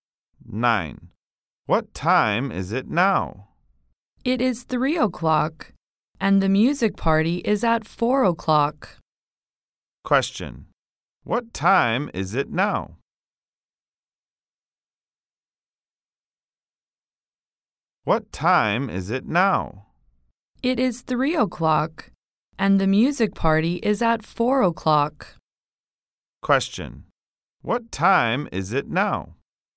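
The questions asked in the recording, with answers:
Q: What time is it now?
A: 3 o'clock.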